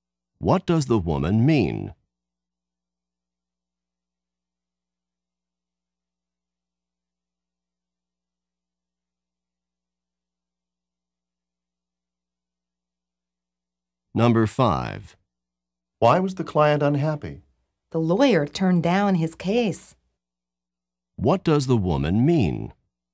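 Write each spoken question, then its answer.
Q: What does the woman mean?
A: The lawyer refused to take his case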